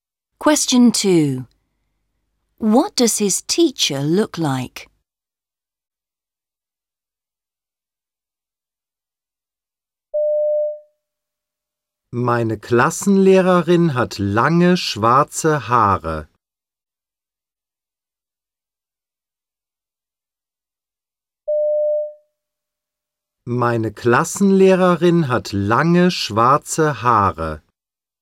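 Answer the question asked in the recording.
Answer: She has long black hair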